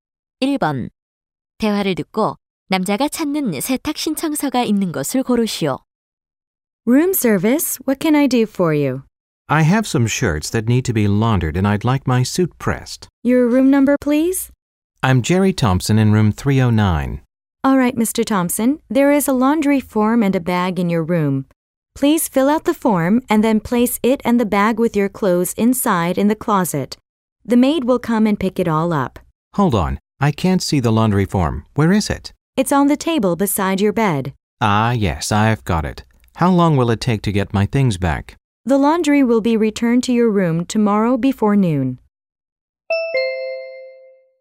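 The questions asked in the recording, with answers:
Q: 대화를 듣고 남자가 찾는 세탁 신청서가 있는 것을 고르시오.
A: 침대 옆 탁자 위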